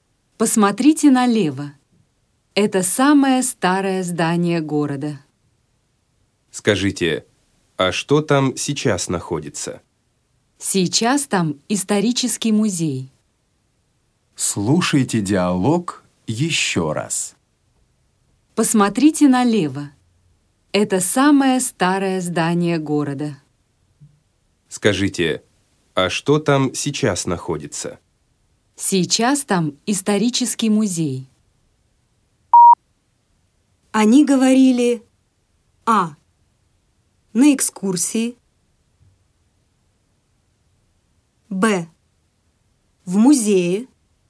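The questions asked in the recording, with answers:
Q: Они говорили:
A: А: На экскурсии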